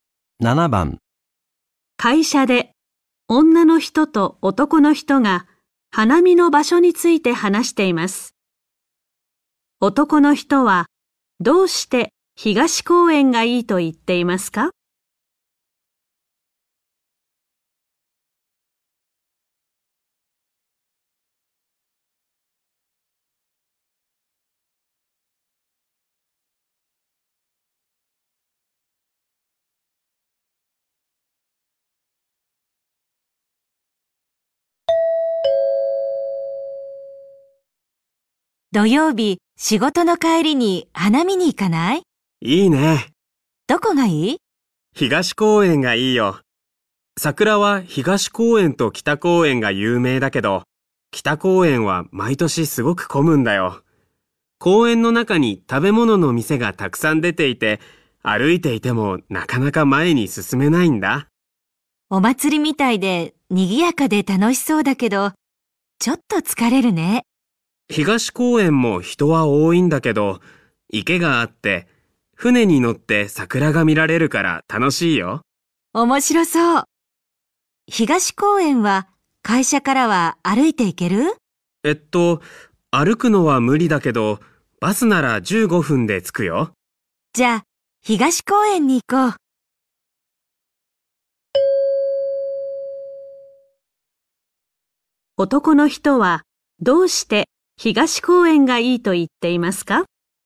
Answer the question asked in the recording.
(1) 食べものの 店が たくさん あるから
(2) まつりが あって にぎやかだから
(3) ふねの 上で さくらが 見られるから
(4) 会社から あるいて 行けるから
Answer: (3) ふねの 上で さくらが 見られるから

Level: N4 Listening · Test 1